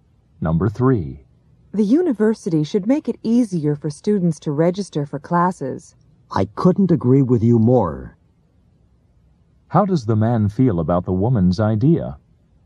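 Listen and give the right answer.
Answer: He completely agrees with her.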